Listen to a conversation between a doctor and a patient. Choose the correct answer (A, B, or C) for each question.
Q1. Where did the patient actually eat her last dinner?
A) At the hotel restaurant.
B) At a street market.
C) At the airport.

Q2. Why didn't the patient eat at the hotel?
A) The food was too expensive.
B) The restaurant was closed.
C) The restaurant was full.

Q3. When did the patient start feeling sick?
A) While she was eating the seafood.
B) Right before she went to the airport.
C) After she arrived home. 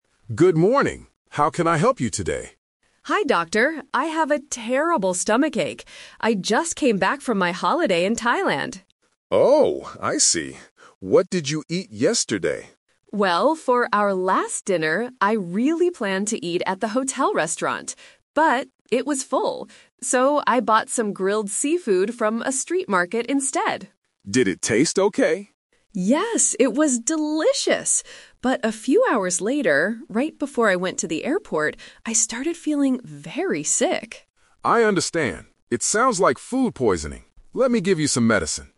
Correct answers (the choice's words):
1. At a street market.
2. The restaurant was full.
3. Right before she went to the airport.

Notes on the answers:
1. The patient explicitly says, "So, I bought some grilled seafood from a street market instead." Option A is the trap: she "planned" to eat at the hotel, but she didn't. Option C is a trap: the airport is where she went later, not where she ate dinner.
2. The patient explains her change of plan by saying, "But it was full." Option A and Option B are plausible reasons for not eating at a hotel restaurant, but they are not mentioned in the audio.
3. The patient states, "...right before I went to the airport, I started feeling very sick." Option A is the trap: she said the food was "delicious" while eating it, so she didn't feel sick then. Option C is a plausible time but is not mentioned in the script.

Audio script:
Doctor: Good morning. How can I help you today?
Patient: Hi, doctor. I have a terrible stomachache. I just came back from my holiday in Thailand.
Doctor: Oh, I see. What did you eat yesterday?
Patient: Well, for our last dinner, I really planned to eat at the hotel restaurant. But it was full. So, I bought some grilled seafood from a street market instead.
Doctor: Did it taste okay?
Patient: Yes, it was delicious! But a few hours later, right before I went to the airport, I started feeling very sick.